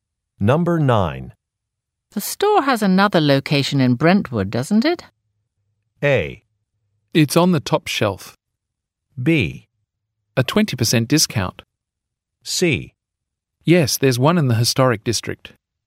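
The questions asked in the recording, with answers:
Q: The store has another location in Brentwood, doesn't it?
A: C: Yes, there's one in the historic district.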